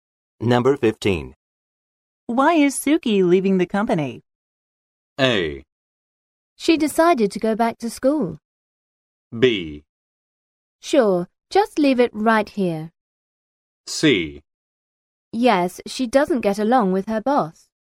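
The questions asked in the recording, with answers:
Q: Why is Suki leaving the company?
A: A: She decided to go back to school.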